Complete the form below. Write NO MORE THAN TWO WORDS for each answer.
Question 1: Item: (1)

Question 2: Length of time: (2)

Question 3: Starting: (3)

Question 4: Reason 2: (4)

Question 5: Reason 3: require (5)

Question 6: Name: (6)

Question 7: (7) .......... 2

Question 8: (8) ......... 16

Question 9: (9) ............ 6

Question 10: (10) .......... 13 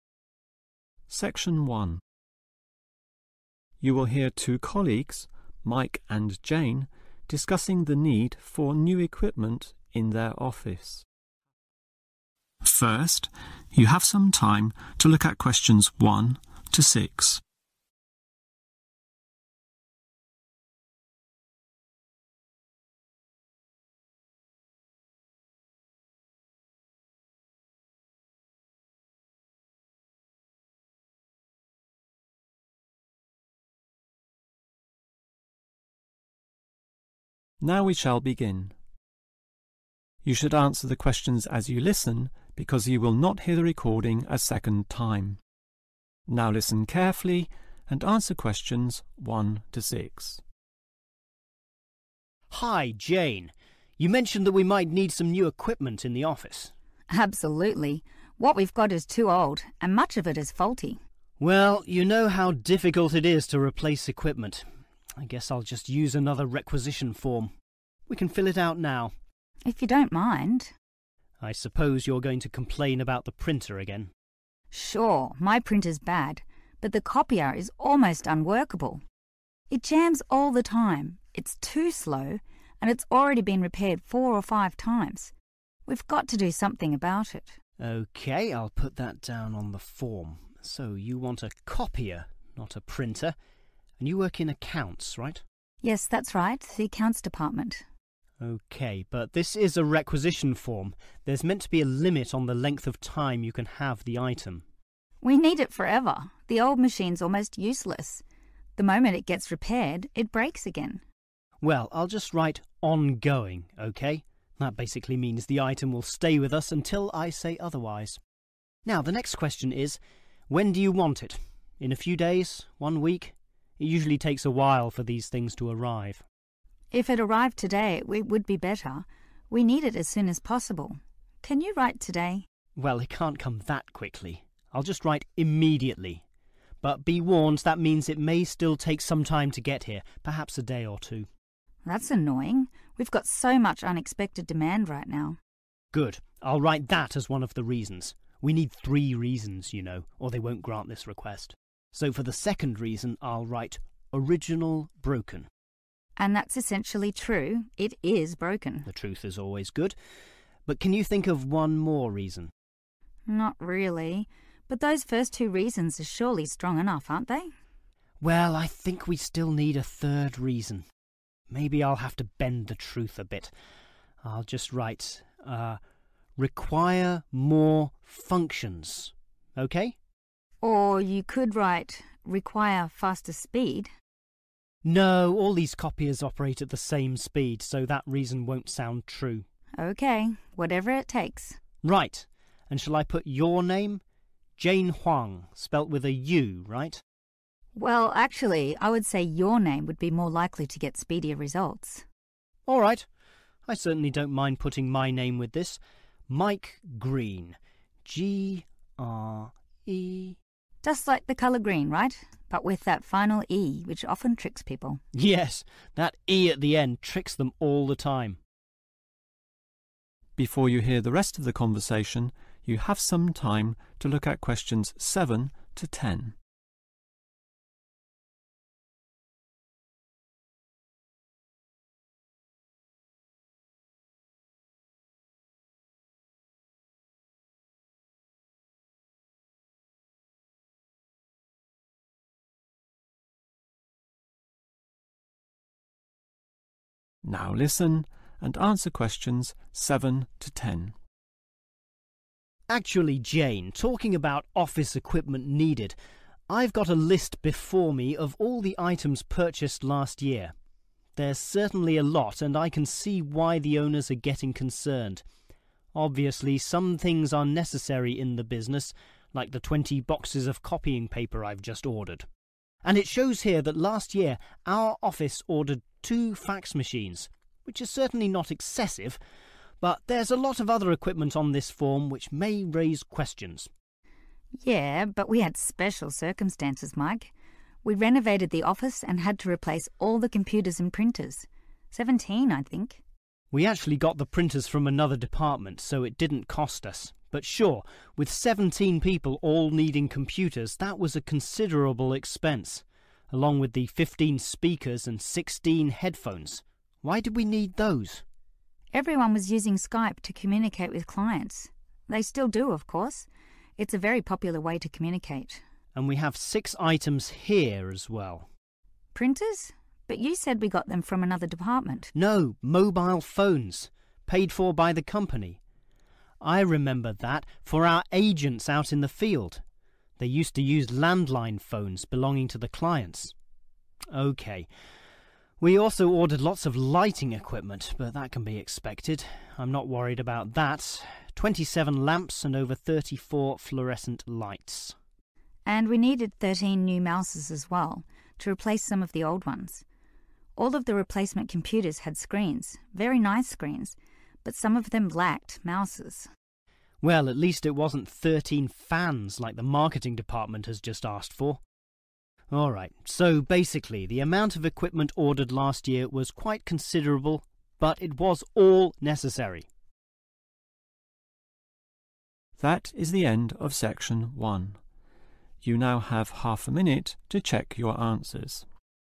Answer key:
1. (photo) copier
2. on going
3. immediately
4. original broken
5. more functions
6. Mike Greene
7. fax machines
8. headphones
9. mobile phones
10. (new) mouses